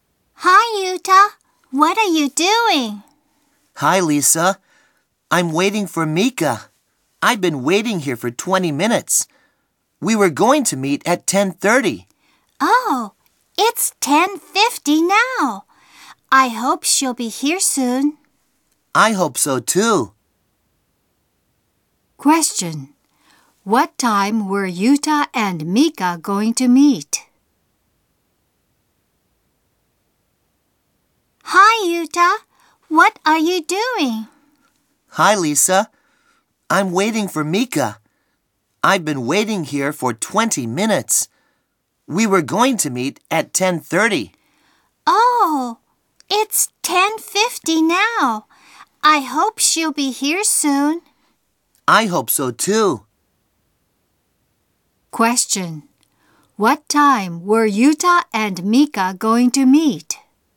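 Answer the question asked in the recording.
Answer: At 10:30.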